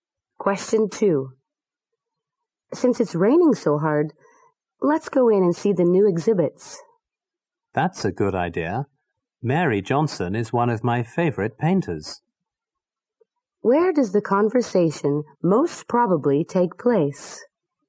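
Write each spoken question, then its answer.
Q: Where does the conversation most probably take place?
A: At an art gallery/museum.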